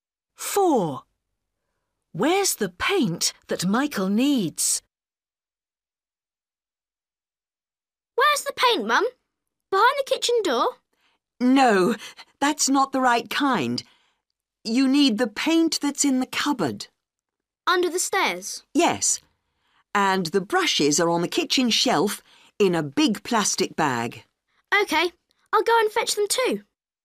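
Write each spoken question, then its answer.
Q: Where's the paint that Michael needs?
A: in the cupboard under the stairs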